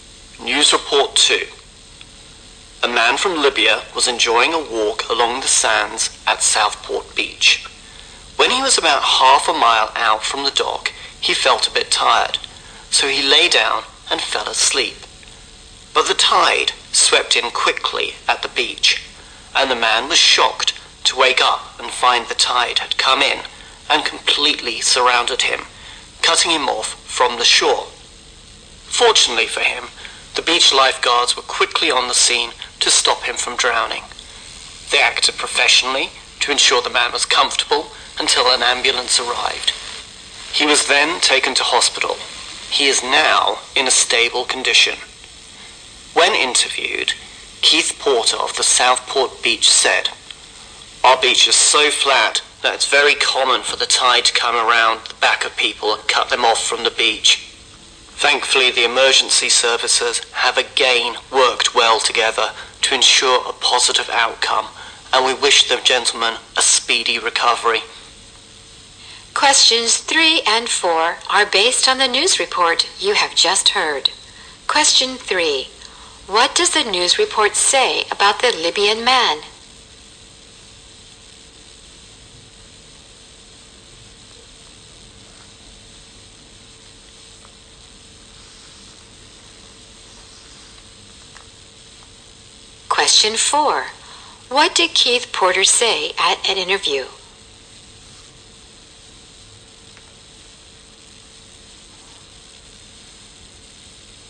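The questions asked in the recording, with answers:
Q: What does the news report say about the Libyan man?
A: He fell asleep on the beach and was cut off by the tide, then rescued by lifeguards.

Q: What did Keith Porter say at an interview?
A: The beach is so flat that the tide often cuts people off from the shore.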